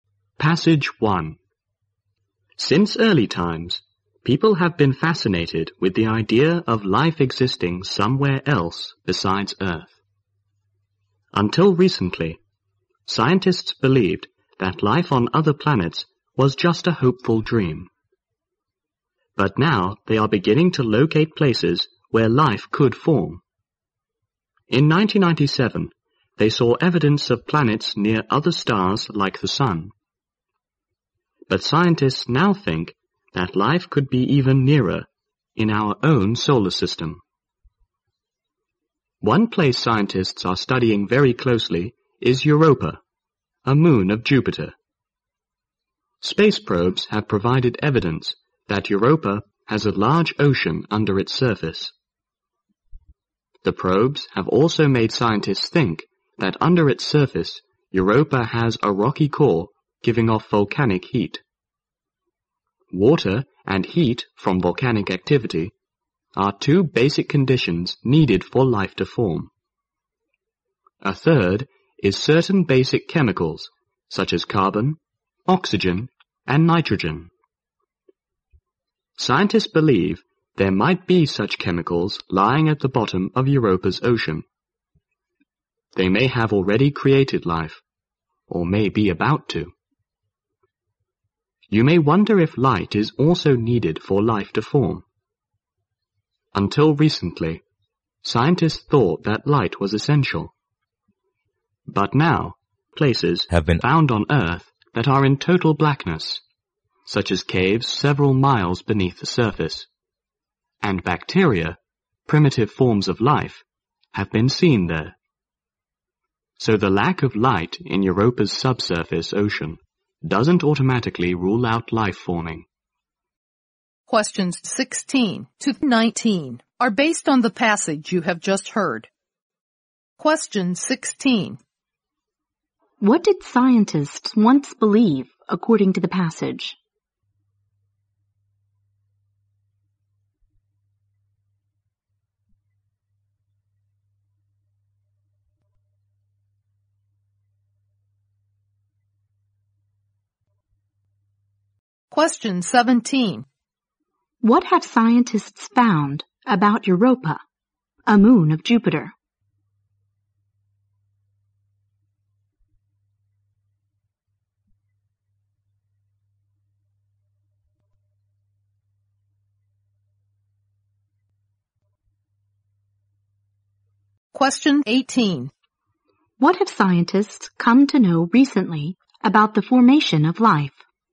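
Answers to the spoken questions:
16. That life on other planets was just a hopeful dream.
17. It has a large ocean under its surface and possibly a rocky core giving off volcanic heat.
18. Light is not necessarily needed for life to form.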